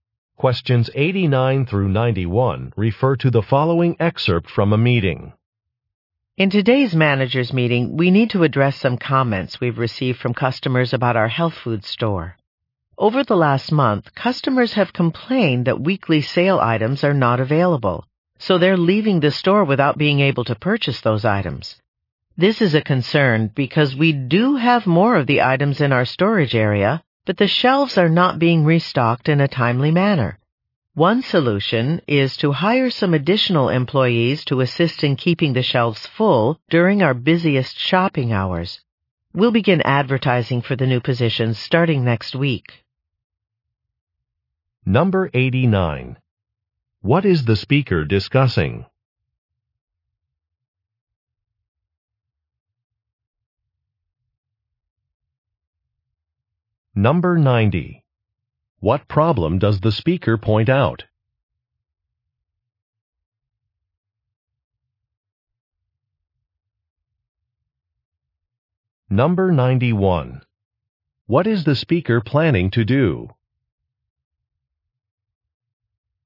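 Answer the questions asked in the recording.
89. Customer complaints
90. Shelves are not restocked in a timely manner
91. Hire additional employees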